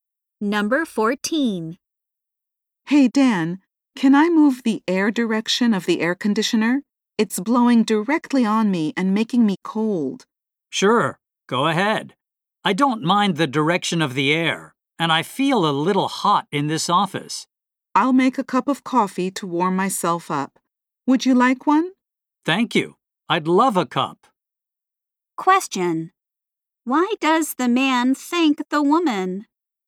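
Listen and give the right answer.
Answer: She offered to make him coffee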